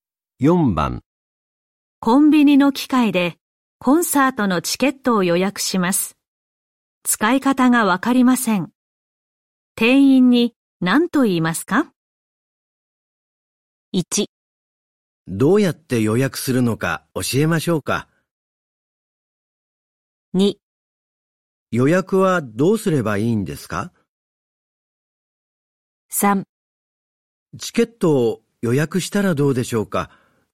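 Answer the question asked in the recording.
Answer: 2: 予約はどうすればいいんですか?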